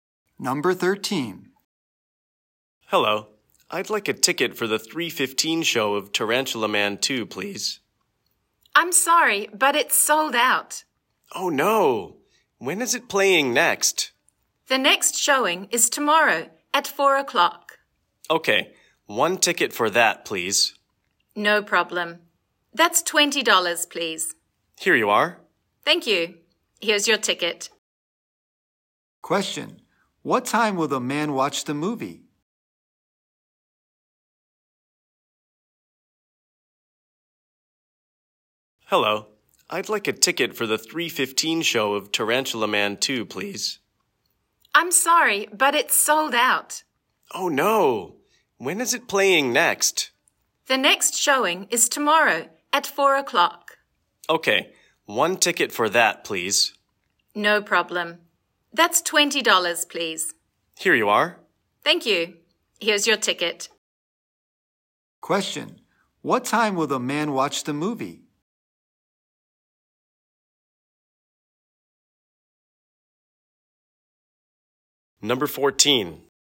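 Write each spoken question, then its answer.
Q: What time will the man watch the movie?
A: Tomorrow at 4 o'clock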